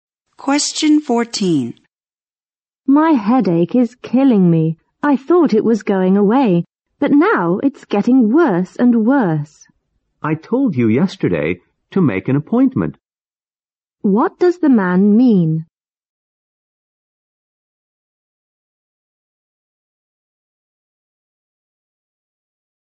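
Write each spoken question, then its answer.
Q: What does the man mean?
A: The woman should have made an appointment with the doctor.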